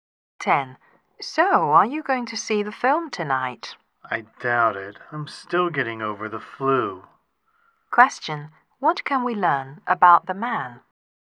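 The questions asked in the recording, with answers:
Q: What can we learn about the man?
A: He is recovering from the flu and probably won't see the film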